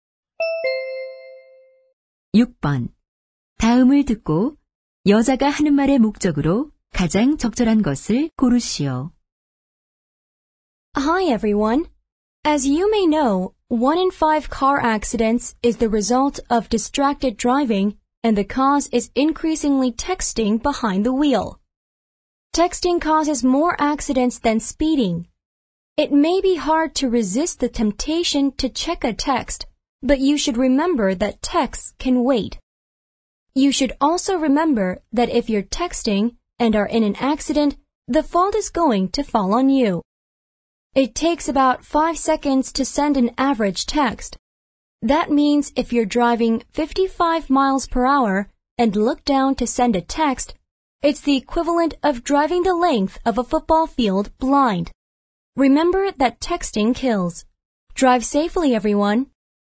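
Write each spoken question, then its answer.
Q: 다음을 듣고 여자가 하는 말의 목적으로 가장 적절한 것을 고르시오.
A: 운전 중 문자 메시지를 보내지 말라고 당부하려고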